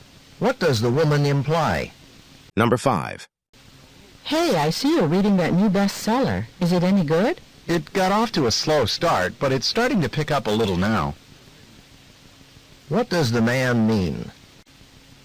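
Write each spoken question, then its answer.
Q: What does the man mean?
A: The book is getting more interesting after a slow start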